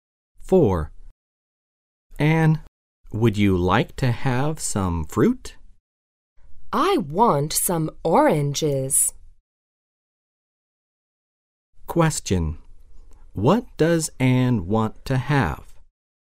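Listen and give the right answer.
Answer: Oranges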